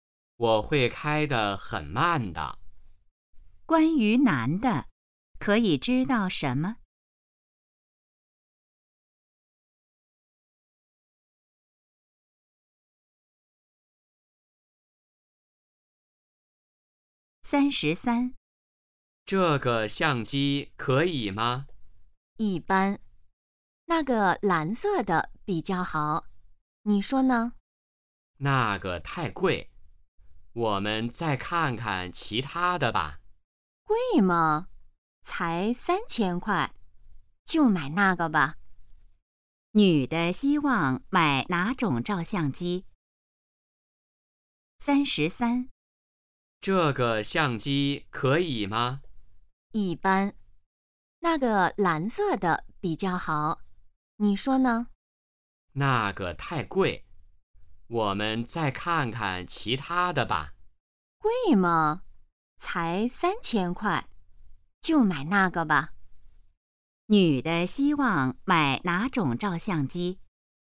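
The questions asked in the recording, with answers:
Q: 女的希望买哪种照相机?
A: 蓝色的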